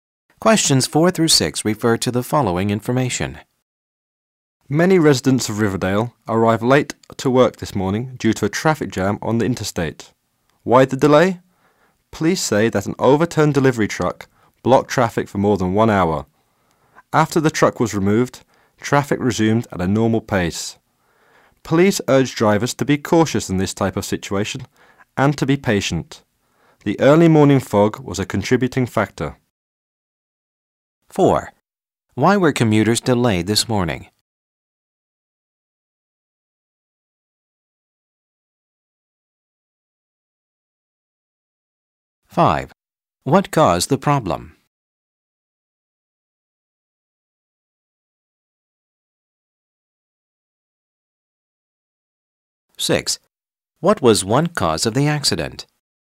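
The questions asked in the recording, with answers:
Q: Why were commuters delayed this morning?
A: A traffic jam on the interstate

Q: What caused the problem?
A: An overturned delivery truck

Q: What was one cause of the accident?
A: Early morning fog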